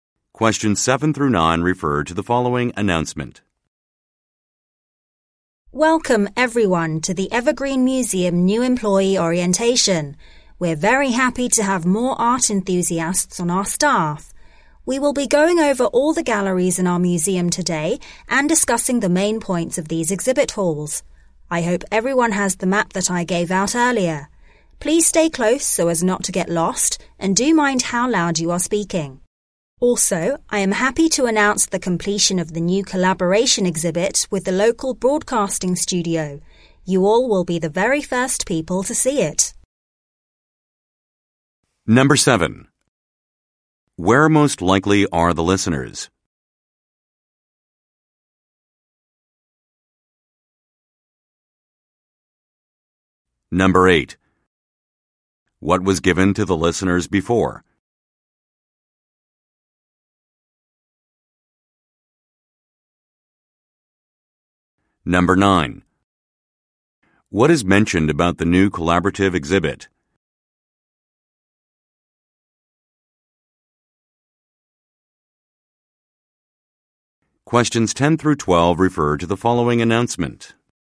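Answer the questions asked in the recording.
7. At a museum
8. A map
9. It was made with a local broadcasting studio and the listeners will be the first to see it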